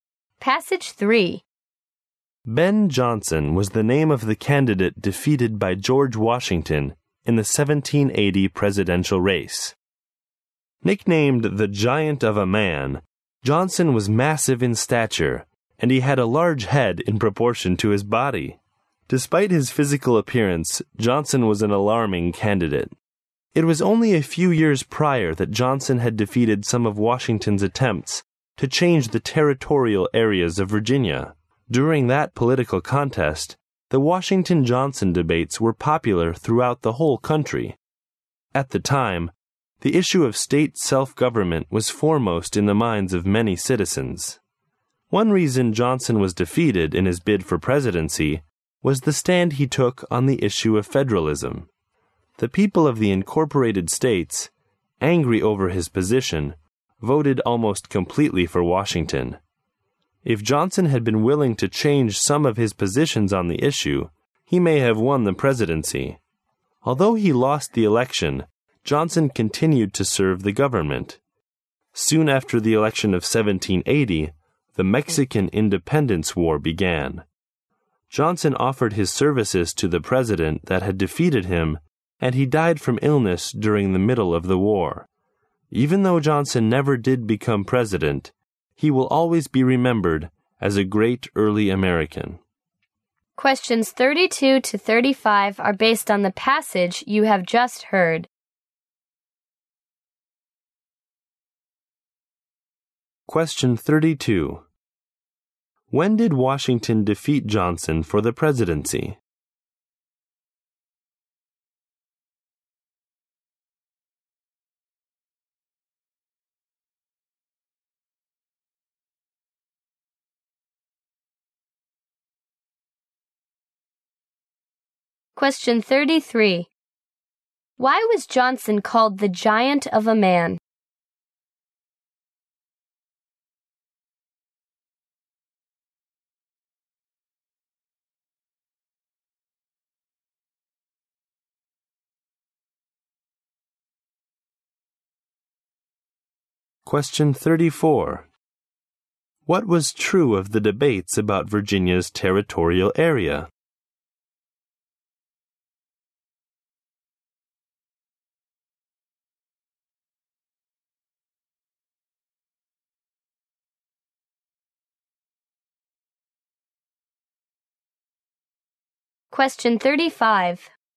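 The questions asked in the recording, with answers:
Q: When did Washington defeat Johnson for the presidency?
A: In 1780

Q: Why was Johnson called the giant of a man?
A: He was massive in stature

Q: What was true of the debates about Virginia's territorial area?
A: They were popular throughout the whole country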